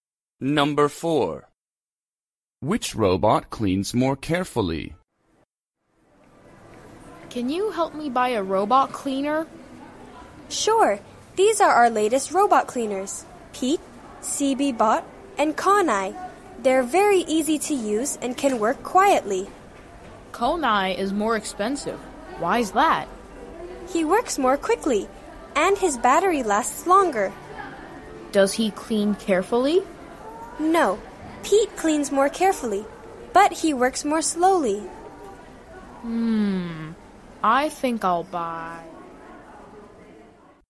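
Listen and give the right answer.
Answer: Pete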